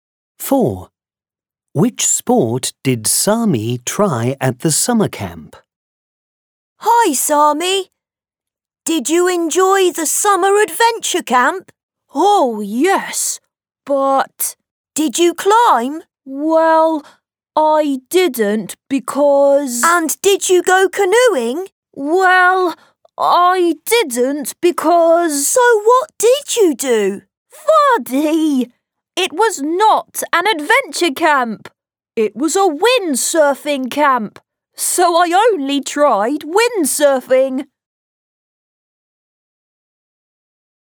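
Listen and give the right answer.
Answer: windsurfing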